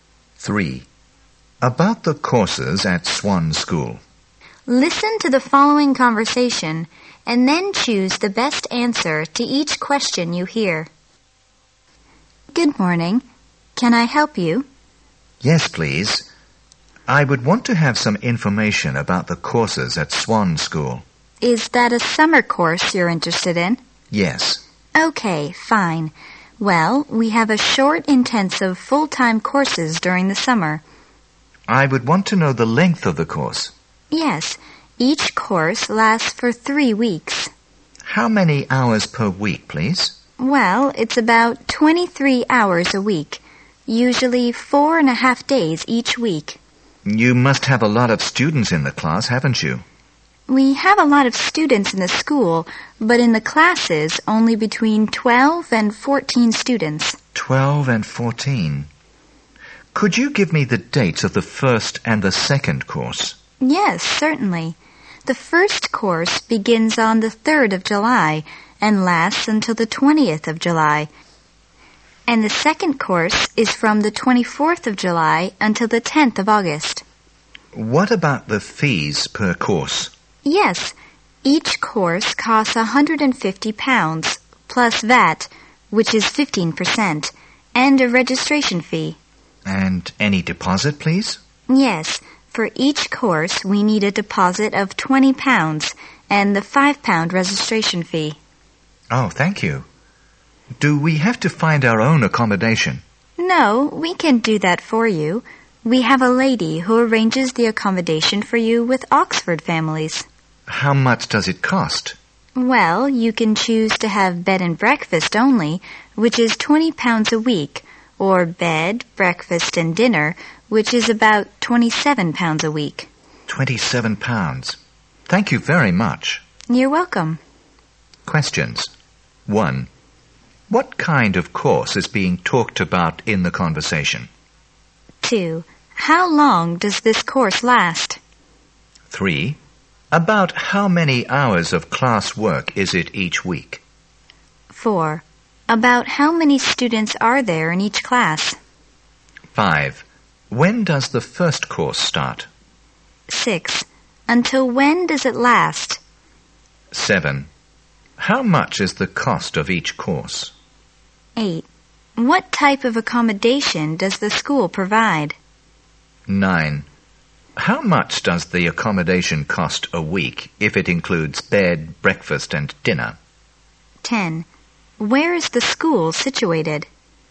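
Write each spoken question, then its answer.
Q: What kind of course is being talked about in the conversation?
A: A short intensive full-time summer course

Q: How long does this course last?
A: 3 weeks

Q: About how many hours of class work is it each week?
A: About 23 hours

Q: About how many students are there in each class?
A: Between 12 and 14

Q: When does the first course start?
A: On the 3rd of July

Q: Until when does it last?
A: The 20th of July

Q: How much is the cost of each course?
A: £150 plus 15% VAT and a registration fee

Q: What type of accommodation does the school provide?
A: Accommodation with Oxford families (bed and breakfast, or bed, breakfast and dinner)

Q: How much does the accommodation cost a week if it includes bed, breakfast and dinner?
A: About £27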